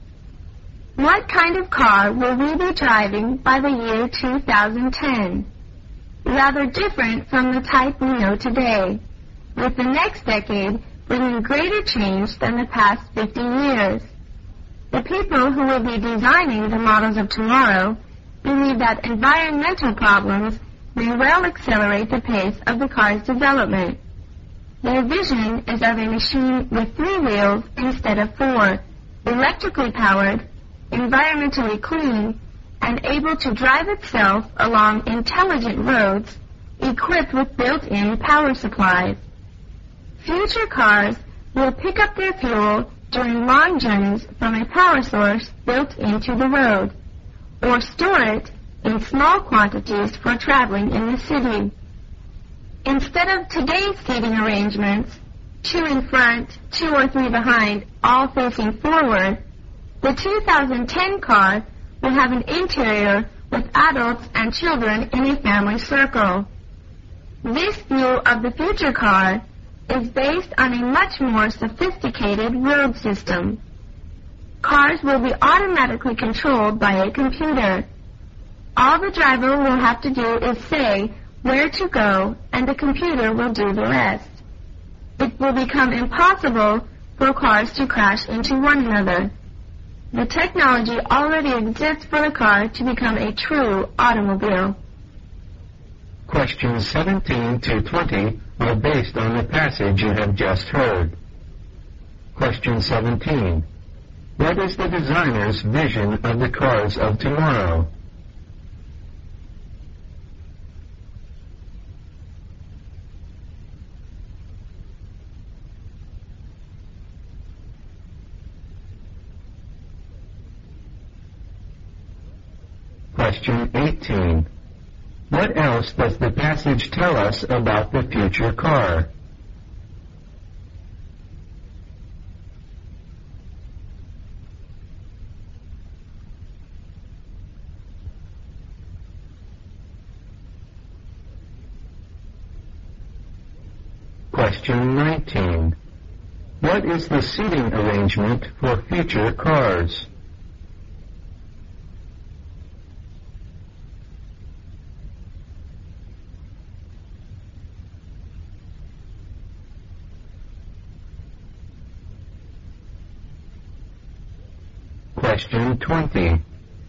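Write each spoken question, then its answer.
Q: What is the designer's vision of the cars of tomorrow?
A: Three-wheeled, electric, clean, self-driving on intelligent roads

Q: What is the seating arrangement for future cars?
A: Adults and children sit in a family circle

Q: What is the only thing the driver of a future car has to do?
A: Say where to go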